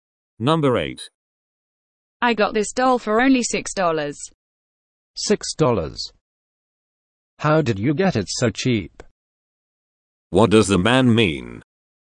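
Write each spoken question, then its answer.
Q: What does the man mean?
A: He is surprised the doll was so cheap.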